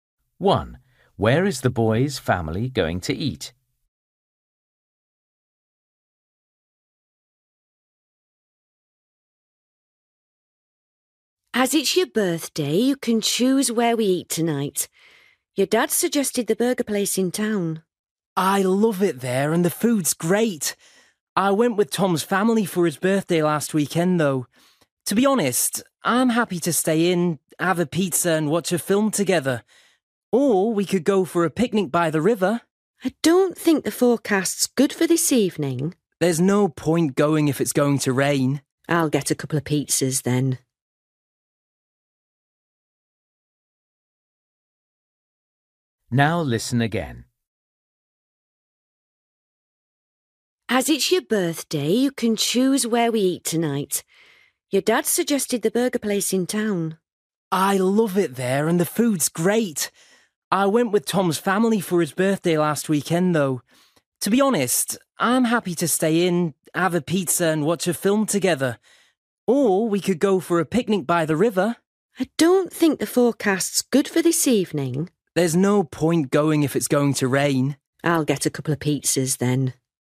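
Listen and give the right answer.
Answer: At home (pizza)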